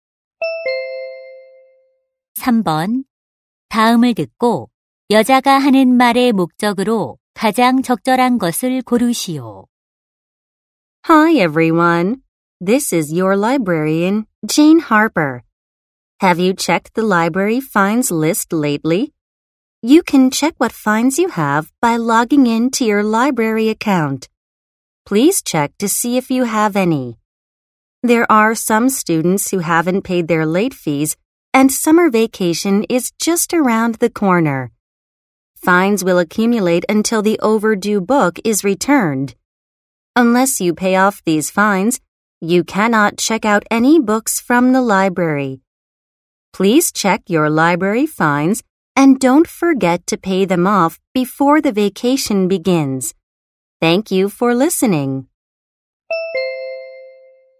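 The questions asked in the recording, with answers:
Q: 다음을 듣고 여자가 하는 말의 목적으로 가장 적절한 것을 고르시오.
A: 방학 전에 도서관 연체료를 확인하고 납부하도록 당부하려고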